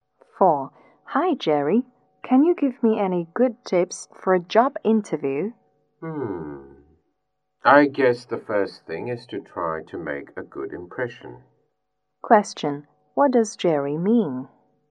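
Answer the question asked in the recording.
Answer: Try to make a good impression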